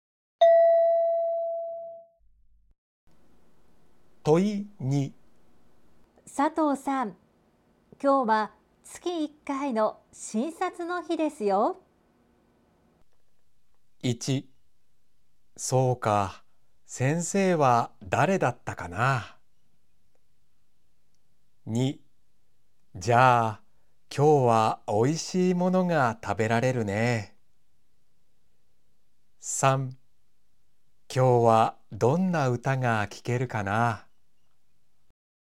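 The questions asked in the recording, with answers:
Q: 佐藤さん、今日は月1回の診察の日ですよ。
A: 1: そうか、先生は誰だったかな。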